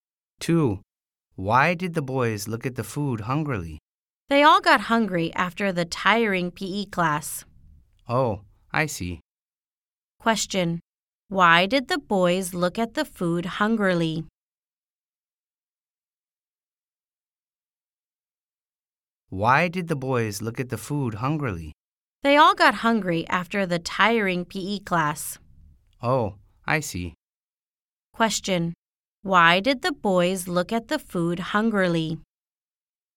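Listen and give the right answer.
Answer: They got hungry after the tiring PE class.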